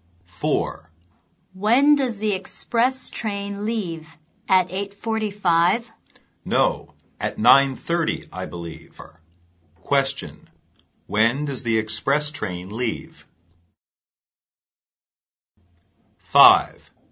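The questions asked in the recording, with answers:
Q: When does the express train leave?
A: At 9:30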